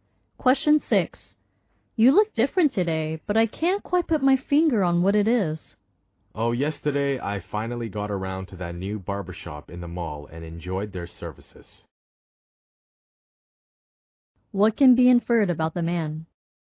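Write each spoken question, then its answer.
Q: What can be inferred about the man?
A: He had a haircut.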